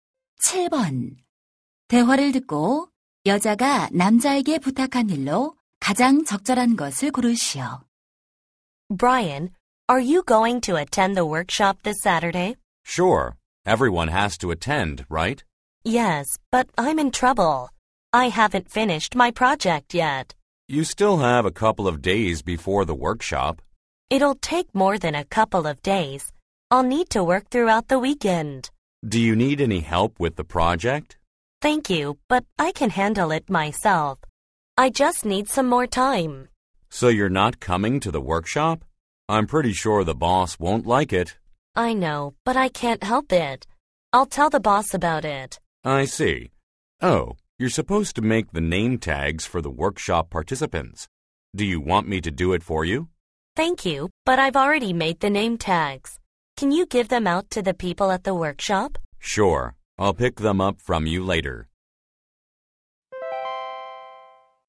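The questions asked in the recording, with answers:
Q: 대화를 듣고 여자가 남자에게 부탁한 일로 가장 적절한 것을 고르시오.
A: 워크숍 참가자들에게 이름표 나눠주기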